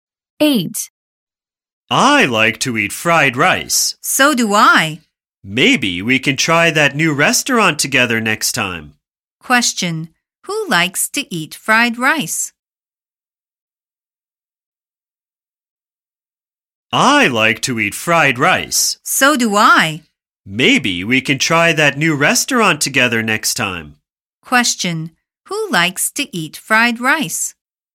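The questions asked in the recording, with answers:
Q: Who likes to eat fried rice?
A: Both speakers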